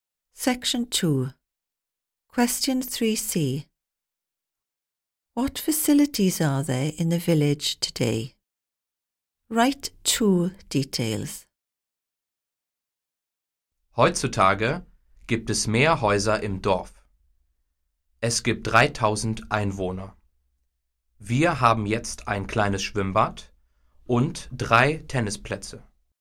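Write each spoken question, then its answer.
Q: What facilities are there in the village today?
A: A small swimming pool and 3 tennis courts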